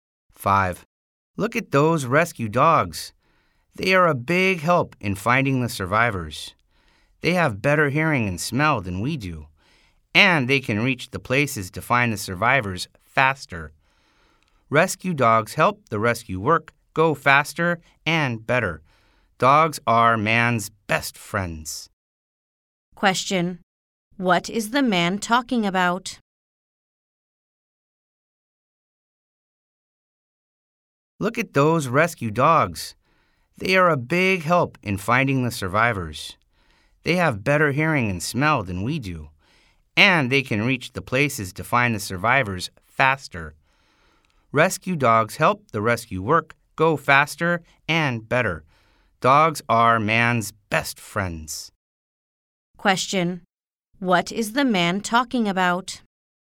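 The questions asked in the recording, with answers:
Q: What is the man talking about?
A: Rescue dogs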